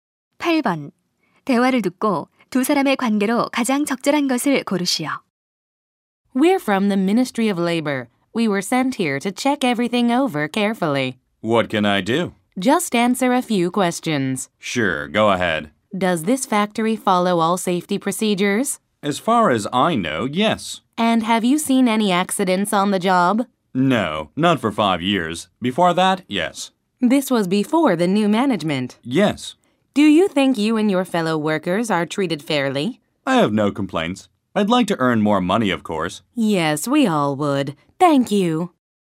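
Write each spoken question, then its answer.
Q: 대화를 듣고 두 사람의 관계로 가장 적절한 것을 고르시오.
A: 노동부 조사관 - 공장 근로자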